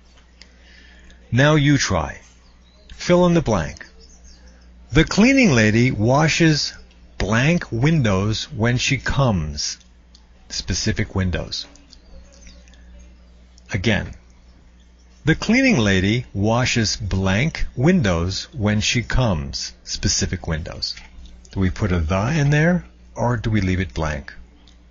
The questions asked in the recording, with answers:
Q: Do we put a the in there or do we leave it blank?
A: The cleaning lady washes the windows when she comes.